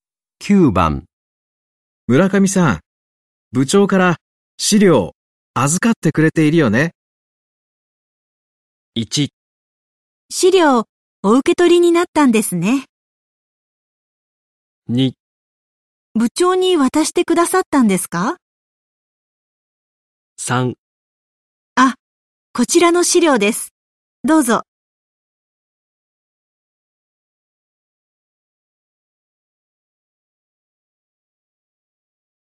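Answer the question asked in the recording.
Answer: 3: あ、こちらの資料です。どうぞ。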